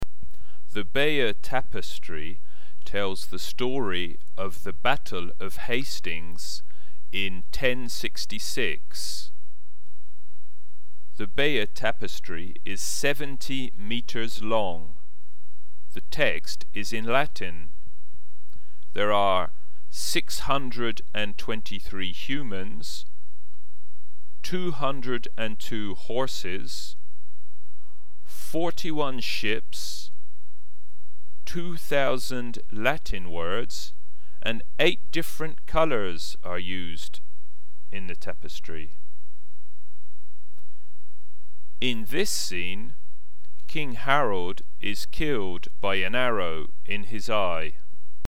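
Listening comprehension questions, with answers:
Listen and fill in the missing words.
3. It is ...............3............... long.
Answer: 70 meters

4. The text is in ..........4....................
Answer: Latin

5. There are ......5.................. humans,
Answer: 623

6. ...............6............. horses,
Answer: 202

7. ..............7......... ships,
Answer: 41

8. ................8........................ latin words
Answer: 2,000

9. ...........9............... different colours.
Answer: 8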